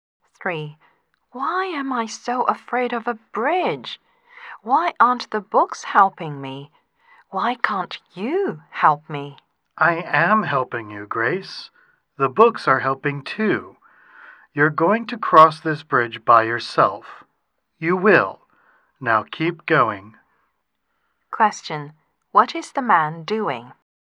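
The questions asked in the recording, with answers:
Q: What is the man doing?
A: Encouraging Grace to cross a bridge by herself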